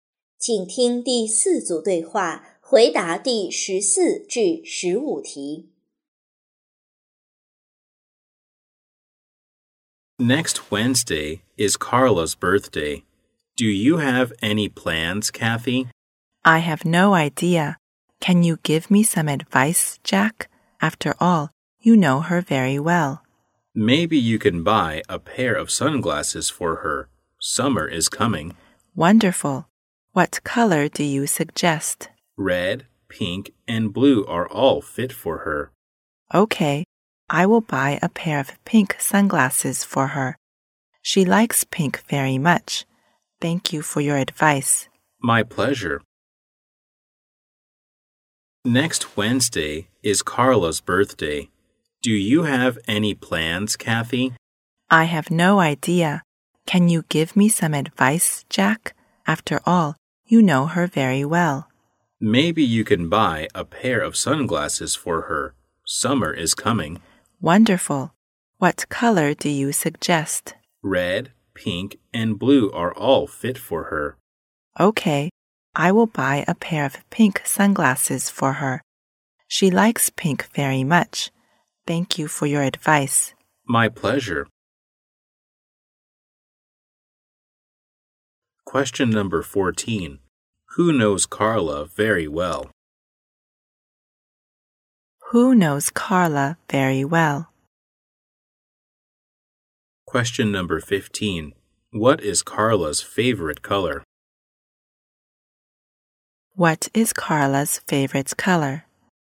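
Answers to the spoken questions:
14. Jack
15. Pink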